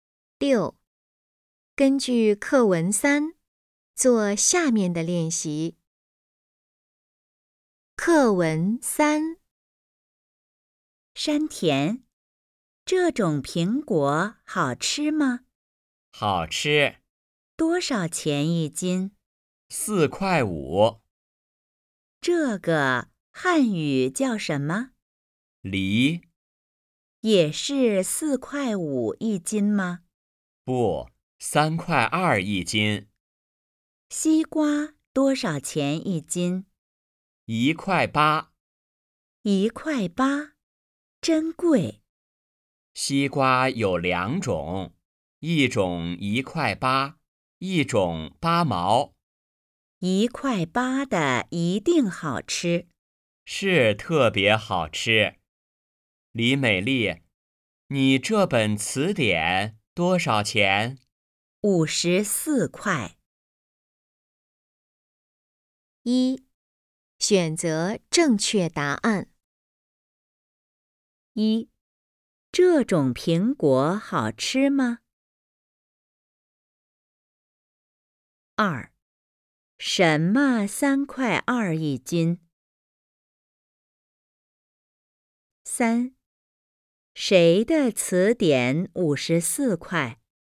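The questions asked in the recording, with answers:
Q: 这种苹果好吃吗?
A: 好吃

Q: 谁的词典54块?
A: 李美丽的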